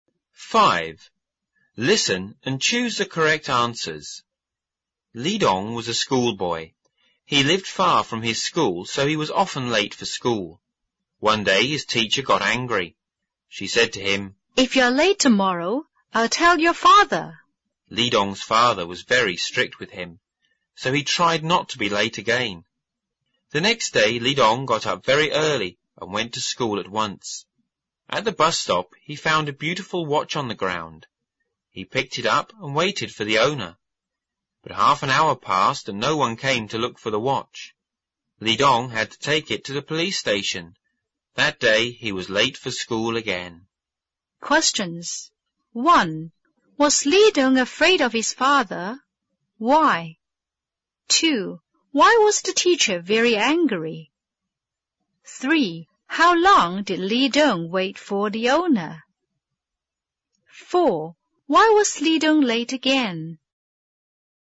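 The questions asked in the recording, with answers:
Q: Why was the teacher very angry?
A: Because Li Dong was often late for school.

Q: How long did Li Dong wait for the owner?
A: Half an hour.

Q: Why was Li Dong late again?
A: He waited for the watch's owner and took it to the police station.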